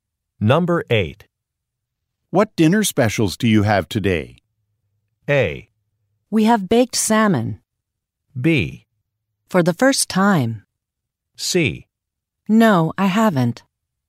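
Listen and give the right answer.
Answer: A: We have baked salmon.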